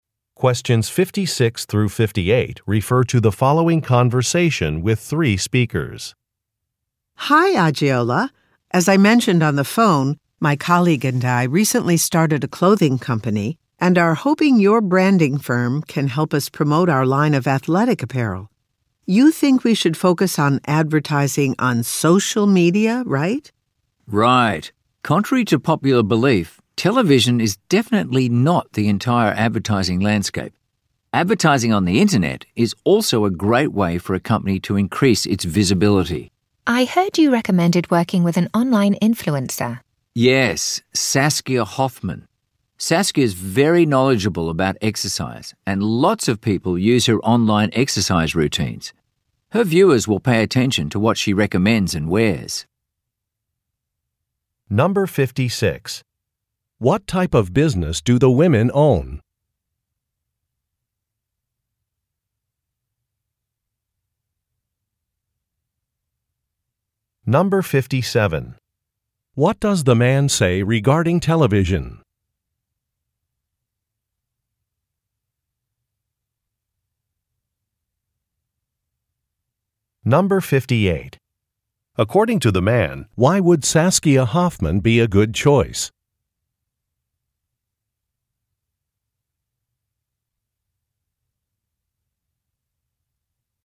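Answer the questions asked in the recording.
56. A clothing company (athletic apparel)
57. It is not the only way to advertise
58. She knows a lot about exercise and many people follow her online routines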